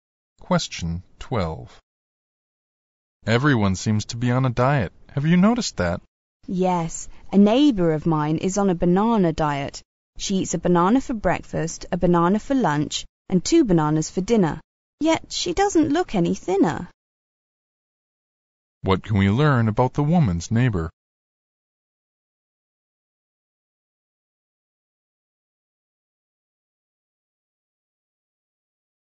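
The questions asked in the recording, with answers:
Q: What can we learn about the woman's neighbor?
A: She is on a banana diet but hasn't lost weight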